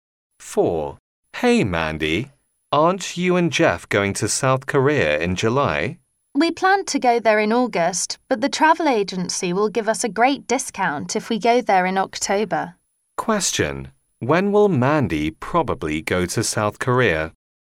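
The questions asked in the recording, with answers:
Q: When will Mandy probably go to South Korea?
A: In October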